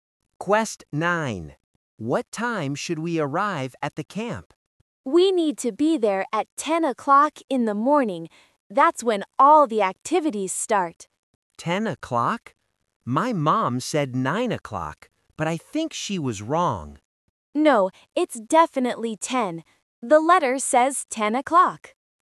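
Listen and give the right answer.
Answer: 10 o'clock in the morning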